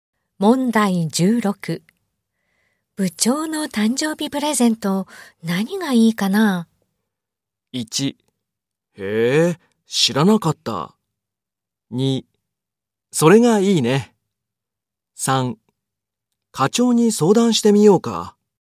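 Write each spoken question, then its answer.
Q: 部長の誕生日プレゼント、何がいいかな?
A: 3: 課長に相談してみようか。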